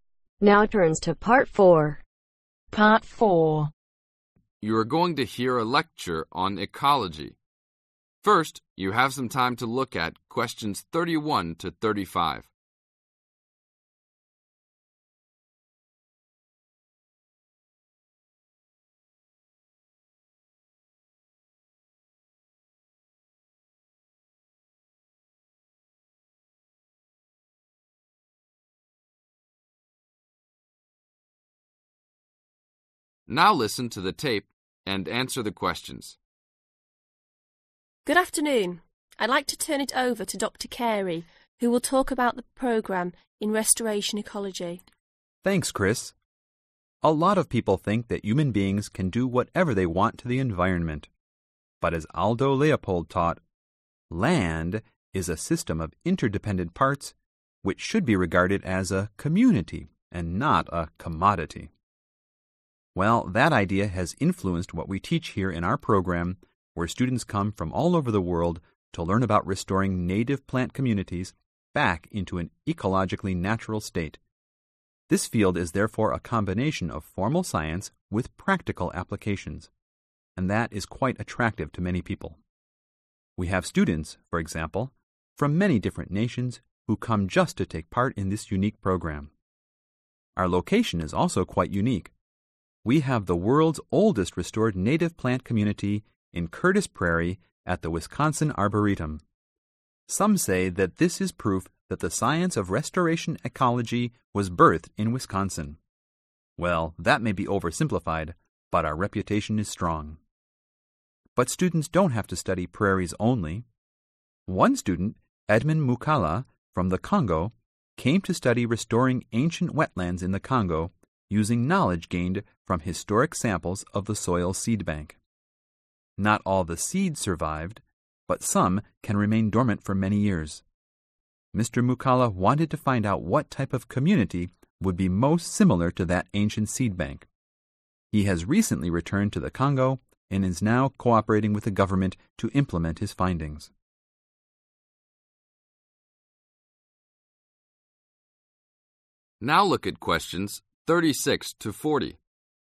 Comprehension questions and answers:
Complete the notes below. Write ONE WORD OR A NUMBER for each answer.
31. Influence – Leopold's concept that land should be viewed as a (31)............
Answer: Community

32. Practice – Restore native plant (32)............ to original condition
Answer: Communities

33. Curtis Prairie is the (33)............ restored prairie in America.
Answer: Oldest

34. Edmond Moukala researched restoring ancient (34)............ in the Congo based on the (35)............ found in the soil of those communities in his homeland.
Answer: Wetlands

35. Edmond Moukala researched restoring ancient (34)............ in the Congo based on the (35)............ found in the soil of those communities in his homeland.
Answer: Seeds